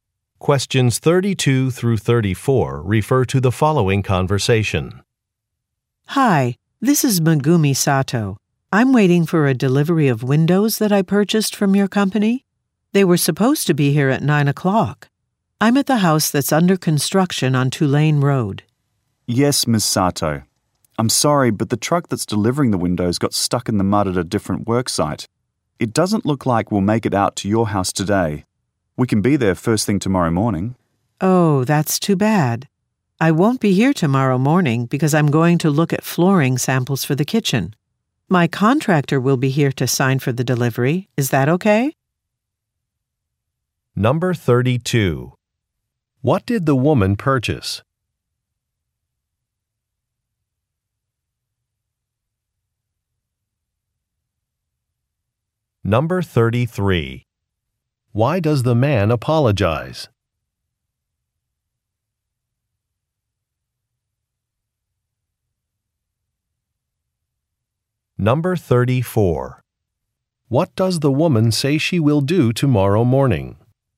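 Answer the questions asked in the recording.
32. Windows
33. The delivery will be late because the truck got stuck in mud
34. Look at flooring samples for the kitchen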